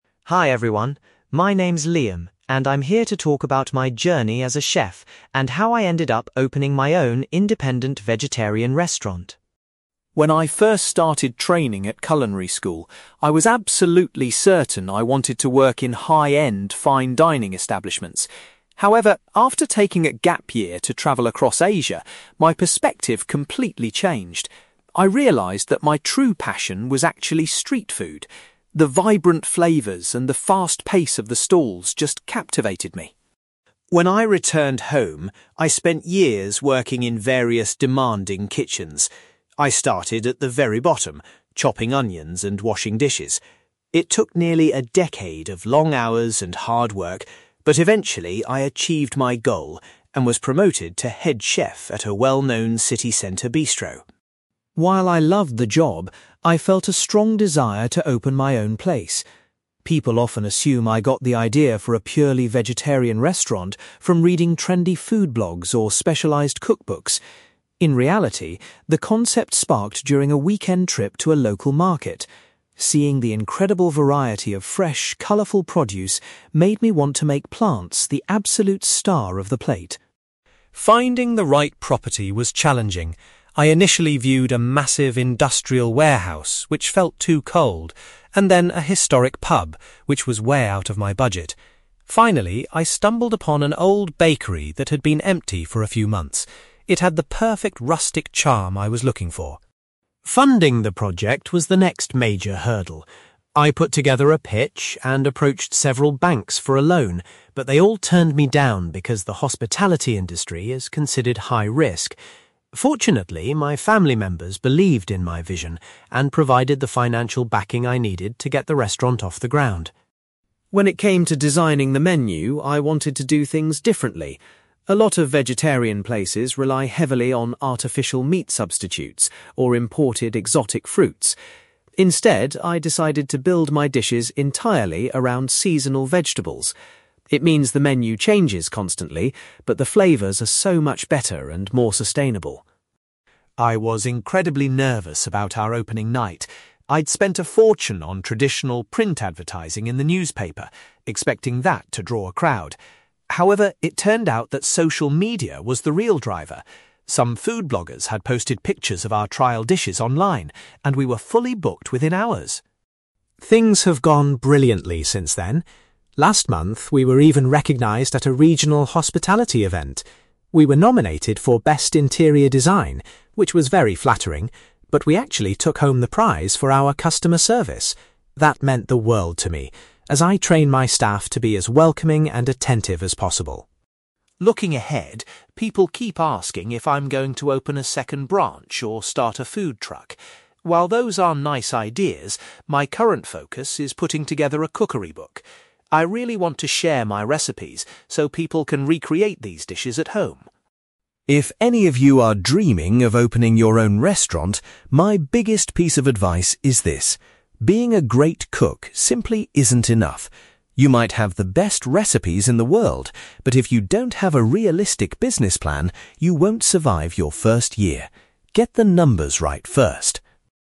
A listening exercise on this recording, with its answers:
You will hear a chef called Liam giving a presentation about his career and opening his own independent vegetarian restaurant. For questions 9-18, complete the sentences with a word or short phrase.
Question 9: Liam discovered that his greatest interest lay in preparing (9)........................... rather than fine dining dishes.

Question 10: After many years of gaining experience in kitchens, Liam reached the position of (10)........................... .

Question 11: The original idea for a purely vegetarian menu came to Liam while he was visiting a (11)........................... .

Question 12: For the location of his new business, Liam eventually chose an (12)........................... instead of a pub or warehouse.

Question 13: When banks refused to offer him a loan, Liam received the necessary money from his (13)........................... .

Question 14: Liam ensures that the main focus of his recipes is always on (14)........................... .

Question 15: Liam was surprised that it was (15)........................... which brought so many customers to the restaurant on its first night.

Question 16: The restaurant recently won a prestigious award recognizing its excellent (16)........................... .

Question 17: Rather than expanding his business, Liam is currently busy working on a (17)........................... .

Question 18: Liam warns that anyone wanting to open a restaurant must prepare a good (18)........................... to be successful.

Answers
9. street food
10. head chef
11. local market
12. old bakery
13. family members
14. seasonal vegetables
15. social media
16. customer service
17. cookery book
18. business plan

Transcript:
Liam: Hi everyone, my name is Liam, and I'm here to talk about my journey as a chef and how I ended up opening my own independent vegetarian restaurant.
When I first started training at culinary school, I was absolutely certain I wanted to work in high-end, fine dining establishments. However, after taking a gap year to travel across Asia, my perspective completely changed. I realised that my true passion was actually street food. The vibrant flavours and the fast pace of the stalls just captivated me.
When I returned home, I spent years working in various demanding kitchens. I started at the very bottom, chopping onions and washing dishes. It took nearly a decade of long hours and hard work, but eventually, I achieved my goal and was promoted to head chef at a well-known city centre bistro.
While I loved the job, I felt a strong desire to open my own place. People often assume I got the idea for a purely vegetarian restaurant from reading trendy food blogs or specialized cookbooks. In reality, the concept sparked during a weekend trip to a local market. Seeing the incredible variety of fresh, colourful produce made me want to make plants the absolute star of the plate.
Finding the right property was challenging. I initially viewed a massive industrial warehouse, which felt too cold, and then a historic pub, which was way out of my budget. Finally, I stumbled upon an old bakery that had been empty for a few months. It had the perfect rustic charm I was looking for.
Funding the project was the next major hurdle. I put together a pitch and approached several banks for a loan, but they all turned me down because the hospitality industry is considered high-risk. Fortunately, my family members believed in my vision and provided the financial backing I needed to get the restaurant off the ground.
When it came to designing the menu, I wanted to do things differently. A lot of vegetarian places rely heavily on artificial meat substitutes or imported exotic fruits. Instead, I decided to build my dishes entirely around seasonal vegetables. It means the menu changes constantly, but the flavours are so much better and more sustainable.
I was incredibly nervous about our opening night. I'd spent a fortune on traditional print advertising in the newspaper, expecting that to draw a crowd. However, it turned out that social media was the real driver. Some food bloggers had posted pictures of our trial dishes online, and we were fully booked within hours!
Things have gone brilliantly since then. Last month, we were even recognized at a regional hospitality event. We were nominated for best interior design, which was very flattering, but we actually took home the prize for our customer service. That meant the world to me, as I train my staff to be as welcoming and attentive as possible.
Looking ahead, people keep asking if I'm going to open a second branch or start a food truck. While those are nice ideas, my current focus is putting together a cookery book. I really want to share my recipes so people can recreate these dishes at home.
If any of you are dreaming of opening your own restaurant, my biggest piece of advice is this: being a great cook simply isn't enough. You might have the best recipes in the world, but if you don't have a realistic business plan, you won't survive your first year. Get the numbers right first!

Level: B2